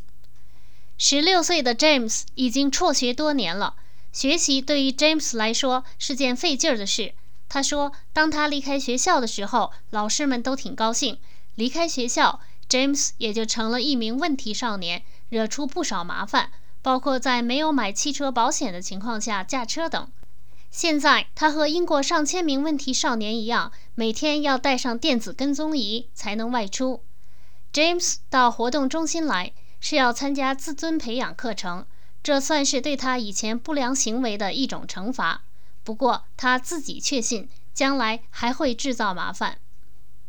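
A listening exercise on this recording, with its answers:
Please answer the following questions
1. James 怎么看自己的将来?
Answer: 他确信自己将来还会制造麻烦。

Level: 3rd Year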